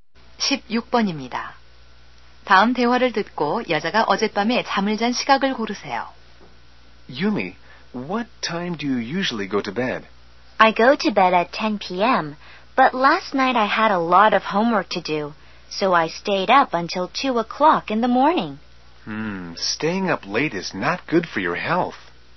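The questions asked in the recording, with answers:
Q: 다음 대화를 듣고 여자가 어젯밤에 잠을 잔 시각을 고르세요.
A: 새벽 2시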